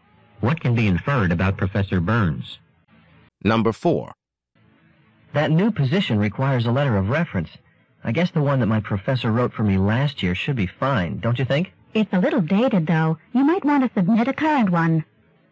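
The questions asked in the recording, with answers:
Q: What does the woman suggest the man do?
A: Submit a more recent letter of reference.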